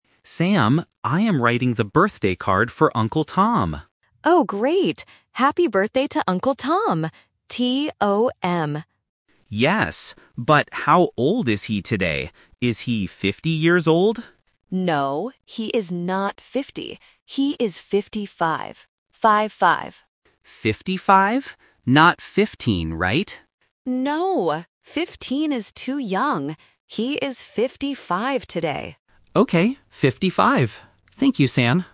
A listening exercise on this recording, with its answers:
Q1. Who is the birthday card for?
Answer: Uncle Tom

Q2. What are the cousins doing?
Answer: Writing a card

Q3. How old is the uncle today?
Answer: 55